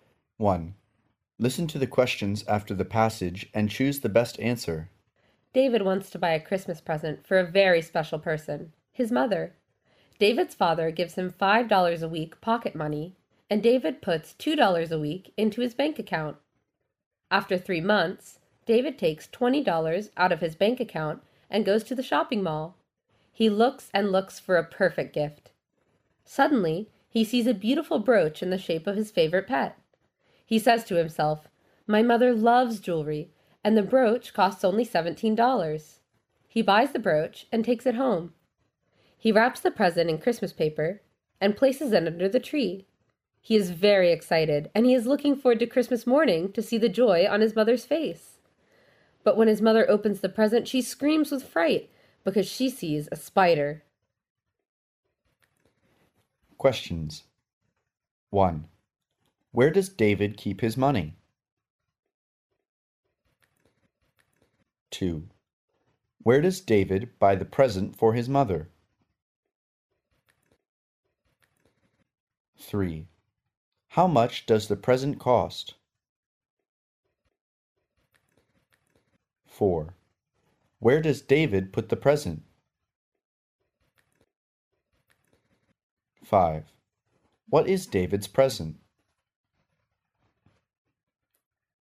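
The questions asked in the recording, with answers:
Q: Where does David keep his money?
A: In his bank account

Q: Where does David buy the present for his mother?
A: At the shopping mall

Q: How much does the present cost?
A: $17

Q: Where does David put the present?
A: Under the Christmas tree

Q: What is David's present?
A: A spider-shaped brooch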